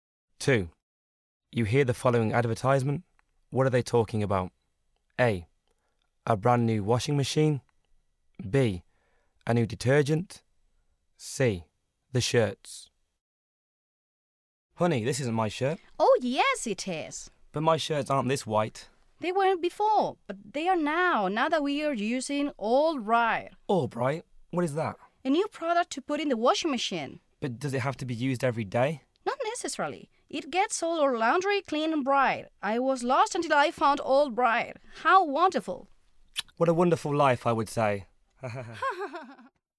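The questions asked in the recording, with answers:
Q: What are they talking about?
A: B: A new detergent.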